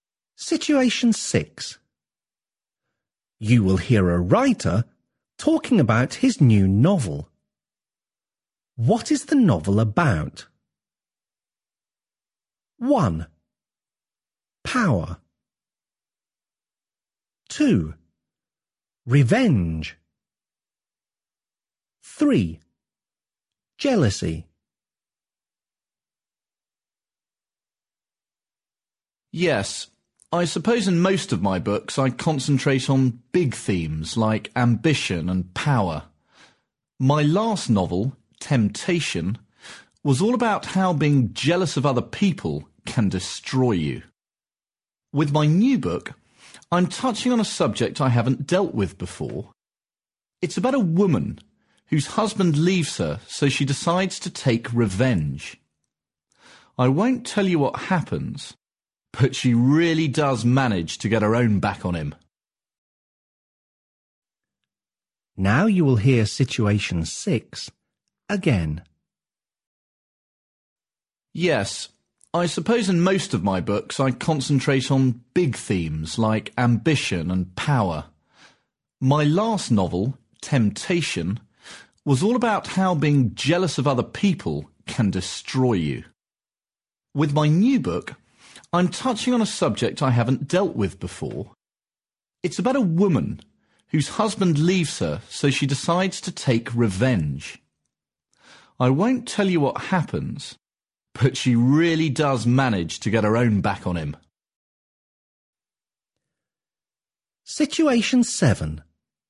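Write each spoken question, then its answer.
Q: What is the novel about?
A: 2: Revenge.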